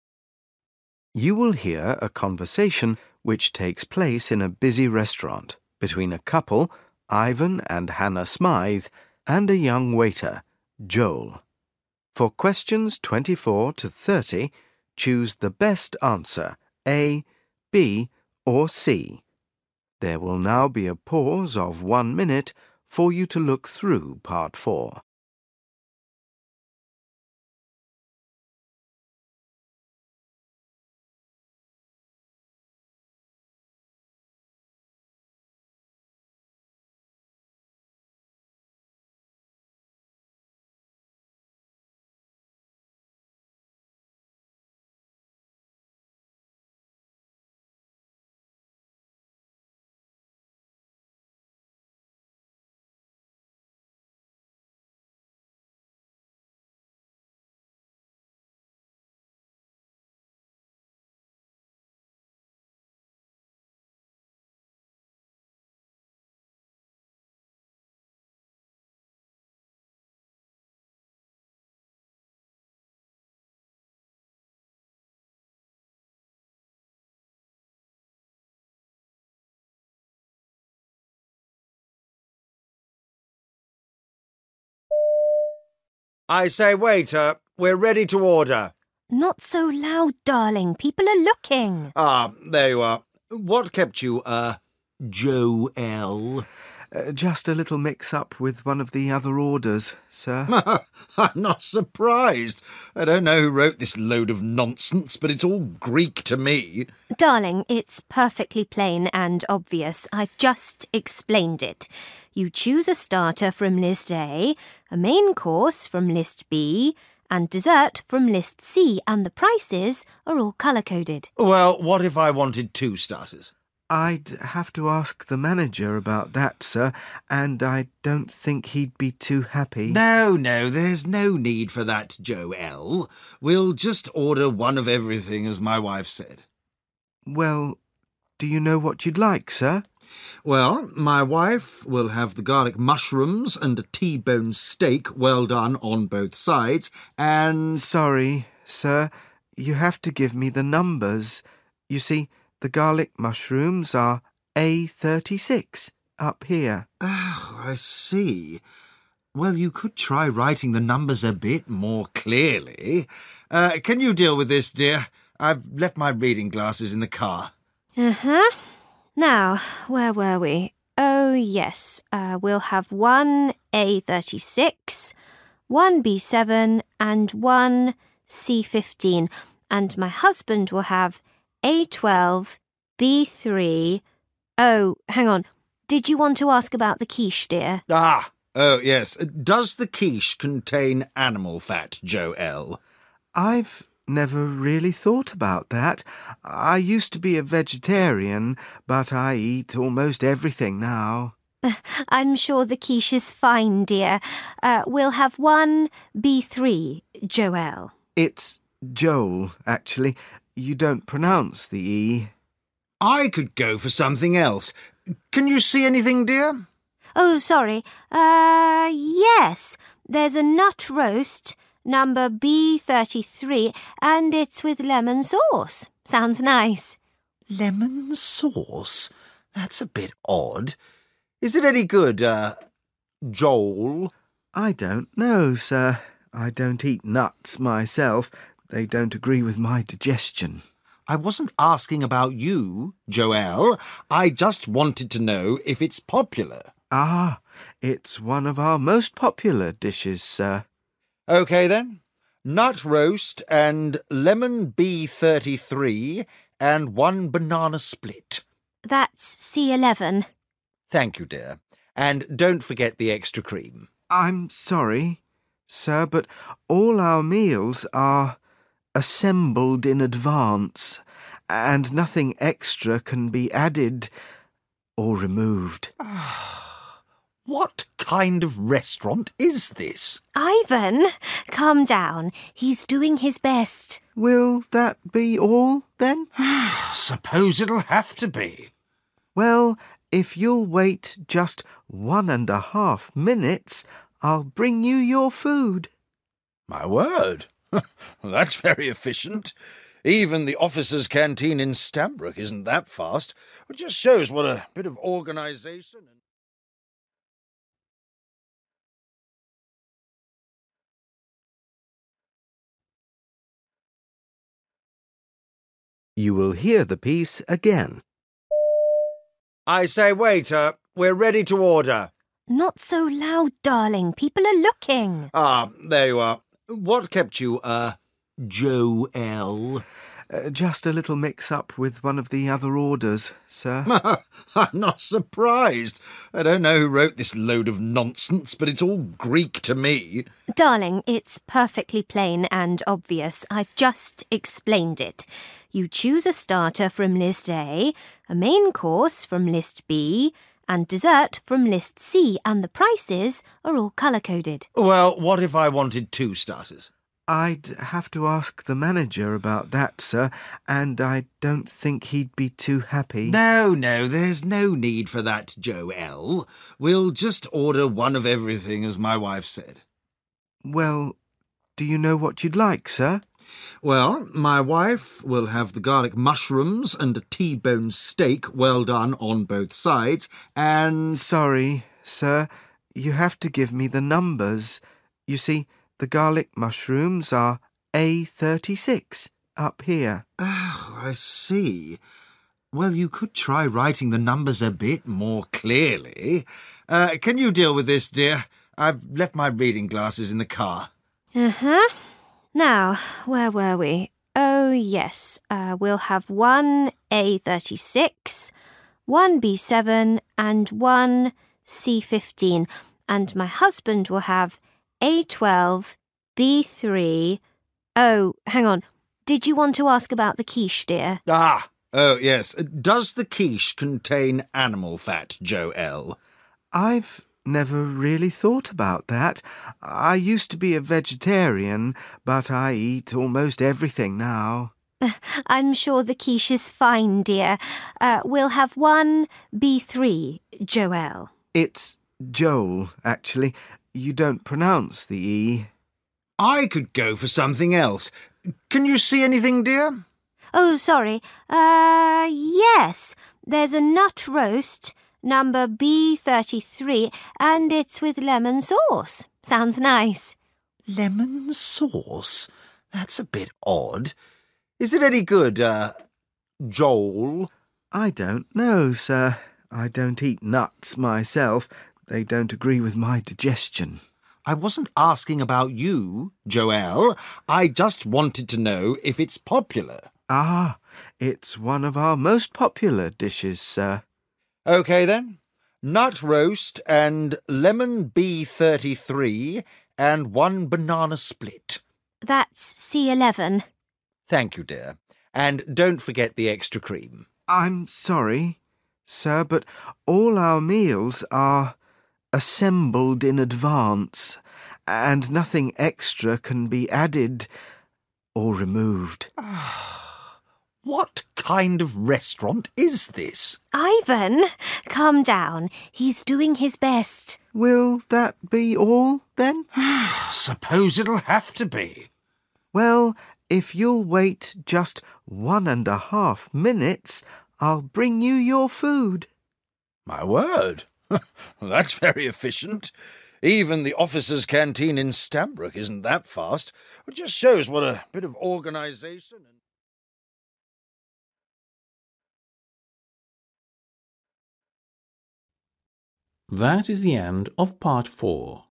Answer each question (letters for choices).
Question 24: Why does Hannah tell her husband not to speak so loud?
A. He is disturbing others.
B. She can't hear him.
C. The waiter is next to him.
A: A

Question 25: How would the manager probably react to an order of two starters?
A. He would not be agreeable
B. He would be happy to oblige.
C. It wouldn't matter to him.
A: A

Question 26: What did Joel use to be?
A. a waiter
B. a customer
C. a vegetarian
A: C

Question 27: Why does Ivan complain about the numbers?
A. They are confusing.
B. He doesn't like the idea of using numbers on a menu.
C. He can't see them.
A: C

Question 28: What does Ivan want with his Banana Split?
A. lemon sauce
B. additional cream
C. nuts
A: B

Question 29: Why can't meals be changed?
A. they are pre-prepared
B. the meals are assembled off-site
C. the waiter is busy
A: A

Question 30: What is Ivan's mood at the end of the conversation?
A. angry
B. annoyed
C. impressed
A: C

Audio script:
I: I say, waiter. We're ready to order.
H: Not so loud, darling – people are looking.
I: Ah, there you are. What kept you? er ... Jo-elle.
J: Just a little mix-up with one of the other orders, sir.
I: I'm not surprised. I don't know who wrote this load of nonsense but it's all Greek to me ...
H: Darling, it's perfectly plain and obvious. I've just explained it. You choose a starter from list A, a main course from list B and dessert from list C and the prices are all colour-coded.
I: Well, what if I wanted two starters.
J: I'd have to ask the manager about that, sir and I don't think he'd be too happy.
I: No, no, there's no need for that Jo-elle, we'll just order one of everything as my wife said.
J: Well, do you know what you'd like, sir?
I: Well, my wife will have the garlic mushrooms and a T-bone steak well-done on both sides and ...
J: Sorry, sir. You have to give me the numbers. You see the garlic mushrooms are A36 up here.
I: Oh, I see. Well, you could try writing the numbers a bit more clearly. Er, can you deal with this, dear? I've left my reading glasses in the car.
H: Uh, uh. Now, where were we? Oh yes. We'll have one A36, one B7 and one C15 and my husband will have A12, B3, oh hang on, did you want to ask about the quiche, dear?
I: Ah, oh yes. Does the quiche contain animal fat, Jo-elle?
J: I've never really thought about that – I used to be a vegetarian but I eat almost everything now.
H: I'm sure the quiche is fine, dear. We'll have one B3, Jo-elle.
J: It's Joel actually, you don't pronounce the 'E'.
I: I could go for something else. Can you see anything, dear?
H: Oh, sorry. There's a nut roast – number B33 and it's with lemon sauce – sounds nice.
I: Lemon sauce? That's a bit odd. Is it any good er ... 'Jole'?
I don't eat nuts myself – they don't agree with my digestion.
I: I wasn't asking about you Jo-elle, I just wanted to know if it's popular.
J: Ah, it's one of our most popular dishes, sir.
I: Okay then, nut roast and lemon B33 and one banana split.
H: That's C11.
I: Thank you, dear – and don't forget the extra cream.
J: I'm sorry, sir, but all our meals are assembled in advance and nothing extra can be added – or removed.
I: What kind of restaurant is this?
H: Ivan, calm down. He's doing his best.
J: Will that be all then?
I: Suppose it'll have to be.
J: Well, if you'll wait just one and a half minutes, I'll bring you your food.
I: My word, that's very efficient. Even the officer's canteen in Stanbroke isn't that fast. Just shows what a bit of organisation and ...